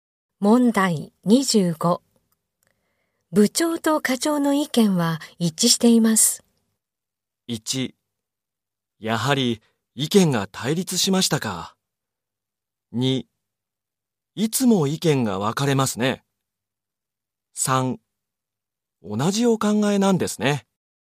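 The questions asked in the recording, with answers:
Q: 部長と課長の意見は一致しています。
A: 3: 同じお考えなんですね。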